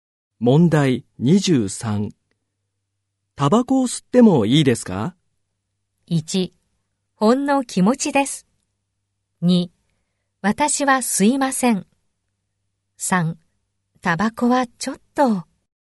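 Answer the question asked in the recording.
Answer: 3: タバコはちょっと。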